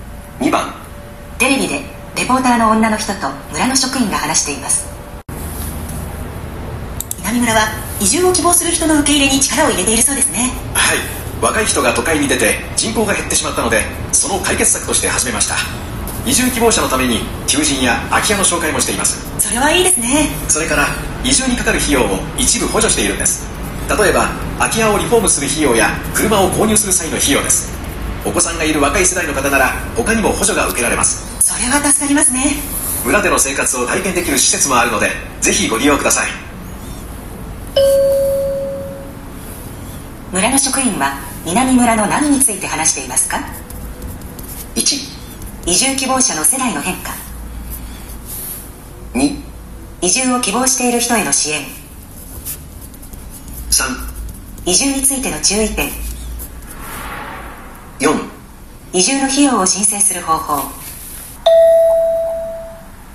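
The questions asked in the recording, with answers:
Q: 村の職員は南村の何について話していますか?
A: 2: 移住を希望している人への支援。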